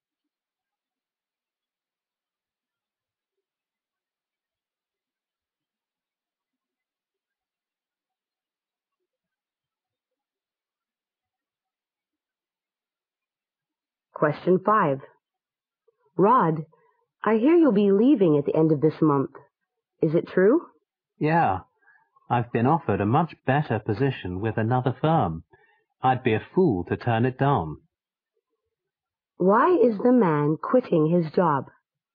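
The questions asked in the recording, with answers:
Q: Why is the man quitting his job?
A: He has been offered a much better position with another firm.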